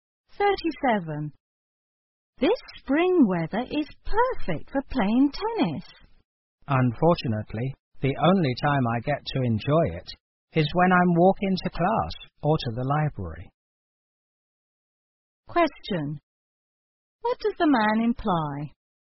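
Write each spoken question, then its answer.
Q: What does the man imply?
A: He is too busy to play tennis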